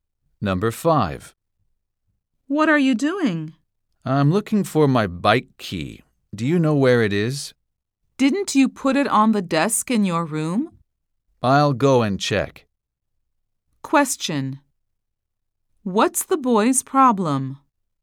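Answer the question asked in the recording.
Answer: He can't find his bike key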